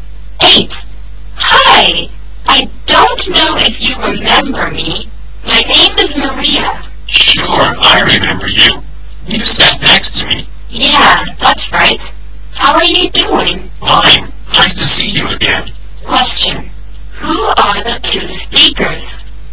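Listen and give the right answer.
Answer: Former classmates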